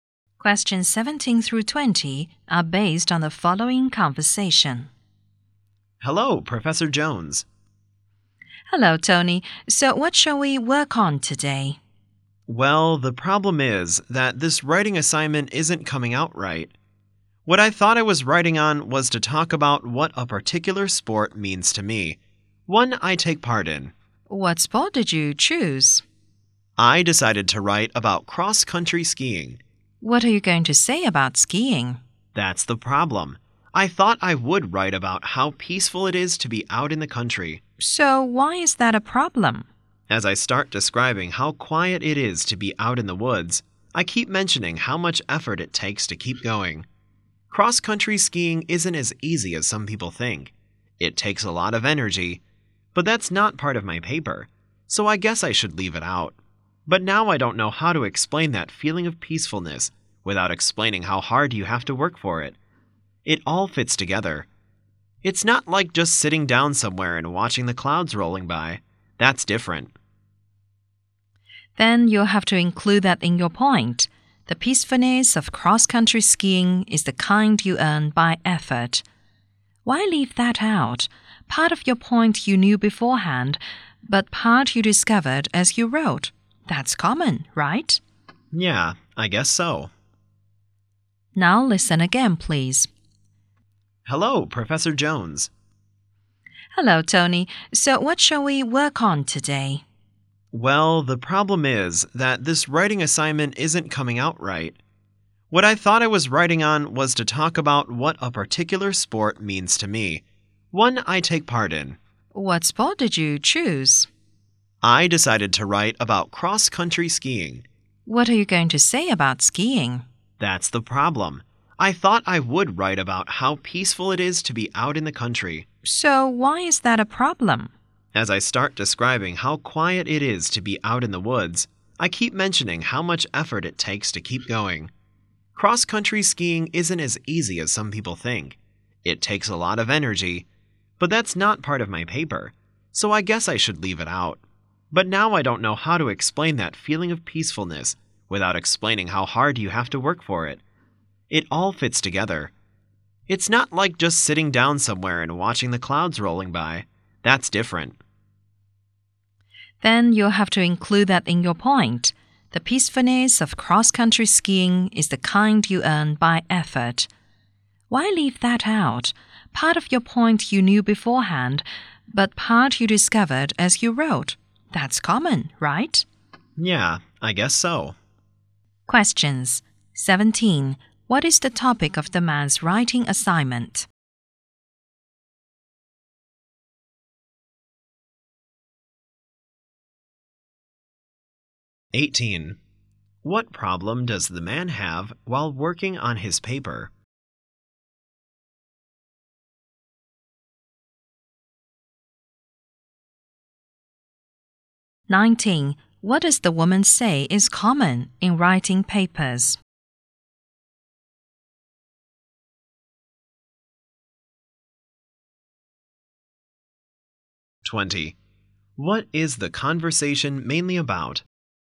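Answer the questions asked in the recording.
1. What a sport (cross-country skiing) means to him
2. He can't explain peacefulness without mentioning the effort
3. Discovering part of your point while writing
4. How to deal with a problem in a writing assignment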